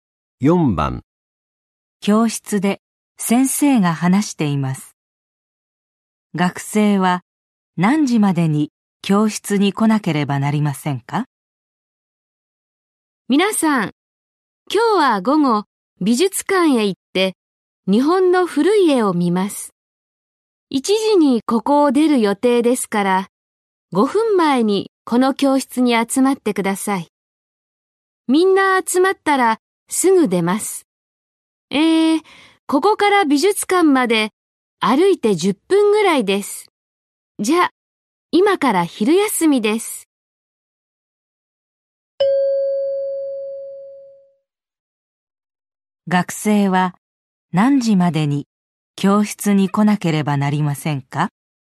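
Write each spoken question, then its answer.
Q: 学生は何時までに教室に来なければなりませんか?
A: 12時55分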